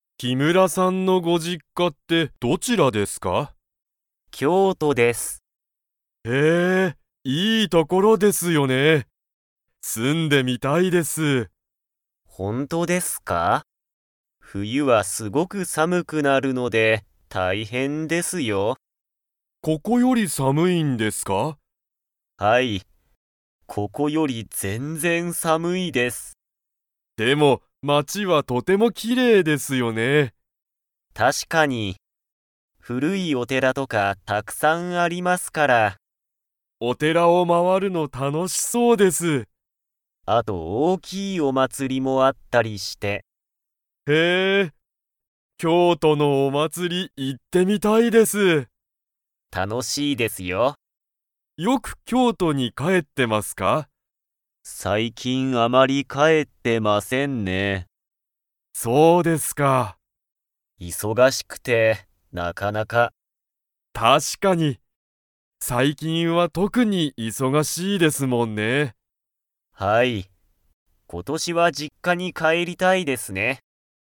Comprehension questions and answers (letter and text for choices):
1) 木村きむらさんの実家じっかはここより 。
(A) 暑あつい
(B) 寒さむい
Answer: (B) 寒さむい

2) 京都きょうとには何なにがたくさんありますか?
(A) 古ふるいお寺てら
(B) 新あたらしいお店みせ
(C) 山田やまださんの実家じっか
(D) おいしいごはん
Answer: (A) 古ふるいお寺てら

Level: Level 4